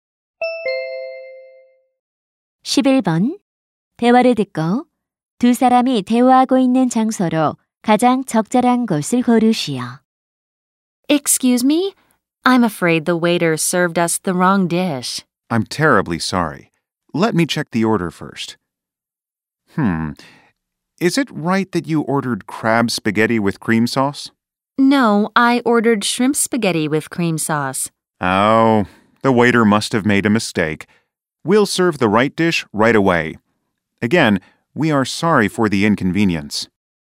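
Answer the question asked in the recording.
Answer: 식당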